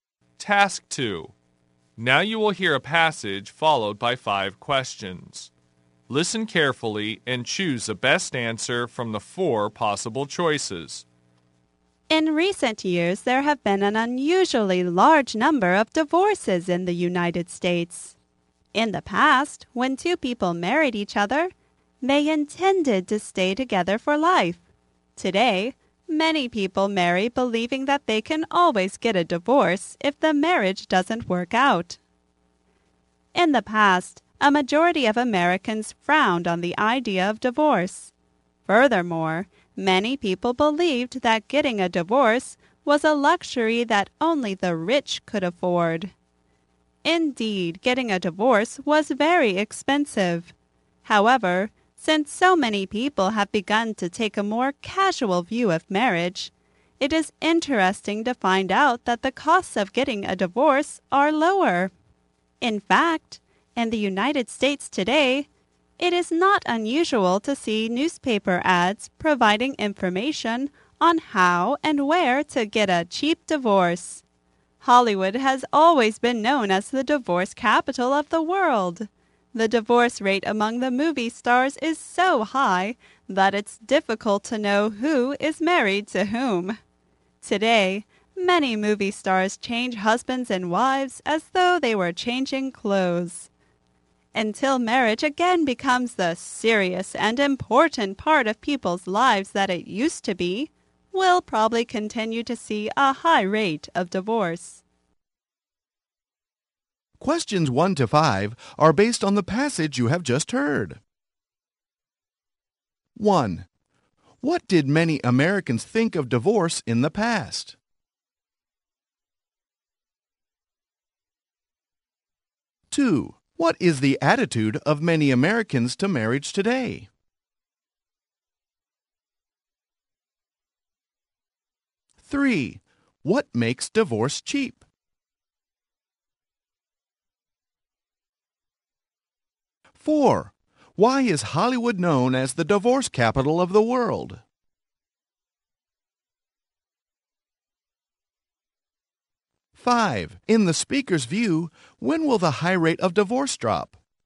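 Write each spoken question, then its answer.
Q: What did many Americans think of divorce in the past?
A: They frowned on it; a luxury only the rich could afford

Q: What is the attitude of many Americans to marriage today?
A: Casual; they can always divorce if it doesn't work out

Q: Why is Hollywood known as the divorce capital of the world?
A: The divorce rate among movie stars is very high

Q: In the speaker's view, when will the high rate of divorce drop?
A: When marriage again becomes a serious and important part of people's lives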